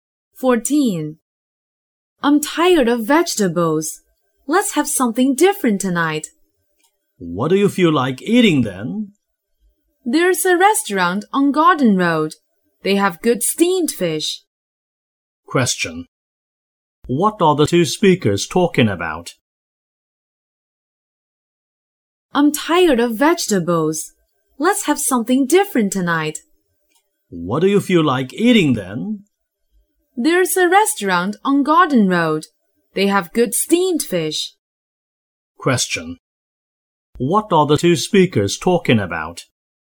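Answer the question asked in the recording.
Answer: What to eat for dinner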